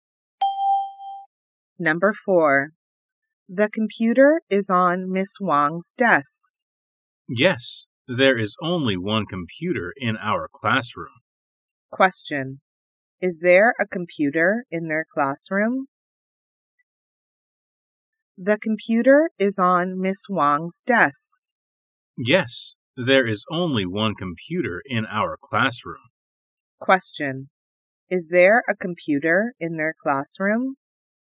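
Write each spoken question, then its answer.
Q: Is there a computer in their classroom?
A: Yes, there is one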